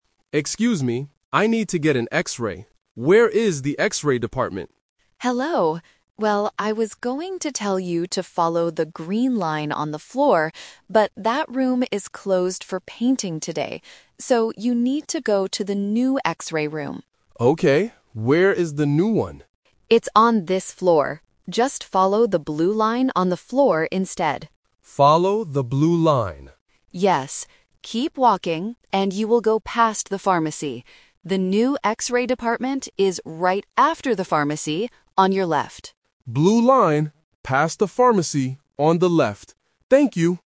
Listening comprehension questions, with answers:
Listen to the conversation between a patient and a hospital receptionist. Choose the correct answer (A, B, or C) for each question.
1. Why can't the patient use the old X-ray room?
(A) Because it is on a different floor.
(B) Because it is closed for painting today.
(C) Because there are too many people.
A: (B) Because it is closed for painting today.

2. What color line should the patient follow?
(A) The green line.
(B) The red line.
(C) The blue line.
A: (C) The blue line.

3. Where is the new X-ray department located?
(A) Inside the pharmacy.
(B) Right after the pharmacy.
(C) Next to the reception desk.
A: (B) Right after the pharmacy.

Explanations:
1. The receptionist uses the "Twist" technique: "...but that room is closed for painting today." The Trap: Option (A) is a trap because the receptionist specifically mentions "It's on this floor" for the new room, so students might confuse the locations. Option (C) is a common situation in hospitals but not mentioned here.
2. The receptionist gives the updated instruction: "Just follow the blue line on the floor instead." The Trap: Option (A) is the classic trap. The green line was the original direction before the plan changed. Option (B) is a random color to distract the listener.
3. The receptionist gives the exact location: "The new X-ray department is right after the pharmacy..." The Trap: Option (A) uses the keyword "pharmacy" but changes the preposition (inside vs. after). The patient only needs to walk past it. Option (C) is where the conversation is happening.

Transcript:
Patient: Excuse me, I need to get an X-ray. Where is the X-ray department?
Receptionist: Hello. Well, I was going to tell you to follow the green line on the floor, but that room is closed for painting today. So, you need to go to the new X-ray room.
Patient: Okay, where is the new one?
Receptionist: It's on this floor. Just follow the blue line on the floor instead.
Patient: Follow the blue line.
Receptionist: Yes. Keep walking and you will go past the pharmacy. The new X-ray department is right after the pharmacy, on your left.

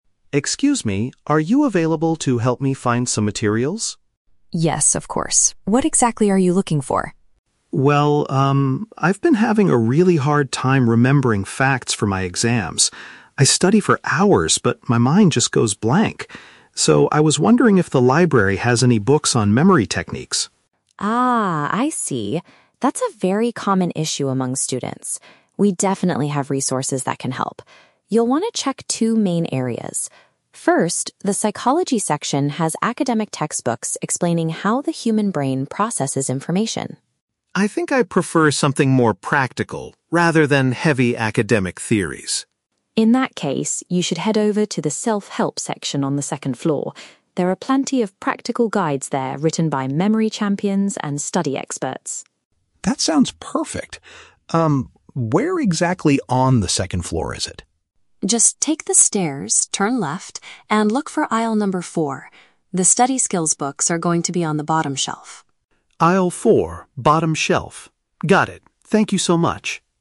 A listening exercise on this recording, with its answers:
Listen to the conversation between a student and a librarian, and choose the correct answer (A, B, or C) for each question.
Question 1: What is Alex's main reason for visiting the library today?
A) He needs to borrow an academic psychology textbook for a class.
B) He wants to find practical advice on how to improve his memory.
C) He is looking for a quiet space to study for his upcoming exams.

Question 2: Why does Alex decide NOT to look in the Psychology section?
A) He thinks the books there are too theoretical and difficult.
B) He has already read all the materials available in that area.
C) He cannot access it because it is closed for renovation.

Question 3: Where can Alex find the specific books that the librarian recommends?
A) On the top shelf of aisle number four.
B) Next to the main staircase on the ground floor.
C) In the self-improvement area on the upper level.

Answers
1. B) He wants to find practical advice on how to improve his memory.
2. A) He thinks the books there are too theoretical and difficult.
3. C) In the self-improvement area on the upper level.

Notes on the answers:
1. Alex says he wants "books on memory techniques" because he has a "hard time remembering facts." He also later specifies he wants something "practical." Option B perfectly paraphrases this. Option A is a trap; the librarian mentions psychology textbooks, but Alex is not looking for them for a class, and he rejects them. Option C is plausible for a library visit but is not mentioned in the audio.
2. When the librarian suggests the Psychology section, Alex responds, "I think I prefer something more practical, rather than heavy academic theories." Option A paraphrases "heavy academic theories" as "too theoretical and difficult." Options B and C are not mentioned in the audio at all.
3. The librarian tells Alex to go to the "Self-Help section on the second floor." Option C paraphrases "Self-Help" as "self-improvement" and "second floor" as "upper level." Option A is a trap; the librarian says the books are on the "bottom shelf," not the top shelf. Option B is a trap; she mentions taking the stairs, but the books are not on the ground floor.

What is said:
Alex: Excuse me, are you available to help me find some materials?
Mrs. Smith: Yes, of course. What exactly are you looking for?
Alex: Well, um, I've been having a really hard time remembering facts for my exams. I study for hours, but my mind just goes blank. So, I was wondering if the library has any books on memory techniques?
Smith: Ah, I see. That's a very common issue among students. We definitely have resources that can help. You'll want to check two main areas. First, the Psychology section has academic textbooks explaining how the human brain processes information.
Alex: I think I prefer something more practical, rather than heavy academic theories.
Smith: In that case, you should head over to the Self-Help section on the second floor. There are plenty of practical guides there written by memory champions and study experts.
Alex: That sounds perfect. Um, where exactly on the second floor is it?
Smith: Just take the stairs, turn left, and look for aisle number four. The study skills books are going to be on the bottom shelf.

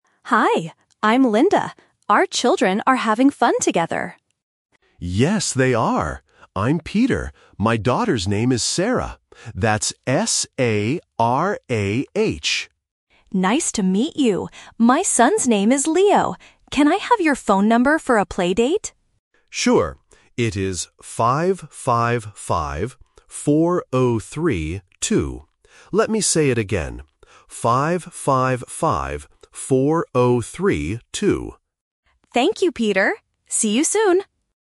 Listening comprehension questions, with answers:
Listen to the conversation between two parents at a park. Circle the correct answer for each question.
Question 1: How do you spell the daughter's name?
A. S-A-R-A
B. S-A-R-A-H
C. S-A-R-R-A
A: B. S-A-R-A-H

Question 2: What is the son's name?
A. Leo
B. Peter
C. Sam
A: A. Leo

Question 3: What is the phone number?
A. 555-4023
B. 555-4032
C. 555-4302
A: B. 555-4032

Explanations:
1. Peter spells the name clearly: "S-A-R-A-H." Option (A) is a trap because it sounds the same but misses the last letter. Option (C) has an extra "R" which is not mentioned.
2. Linda says, "My son's name is Leo." Option (B) Peter is the father's name (the Trap). Option (C) is not mentioned in the audio.
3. Peter repeats the number twice: "555-4032." Option (A) is a trap because it swaps the last two digits (23 instead of 32). Option (C) changes the middle digits to confuse the listener.

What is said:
Linda: Hi! I'm Linda. Our children are having fun together.
Peter: Yes, they are! I'm Peter. My daughter's name is Sarah. That's S-A-R-A-H.
Linda: Nice to meet you. My son's name is Leo. Can I have your phone number for a playdate?
Peter: Sure! It is 555-4032. Let me say it again: 555-4032.
Linda: Thank you, Peter. See you soon!

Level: A1

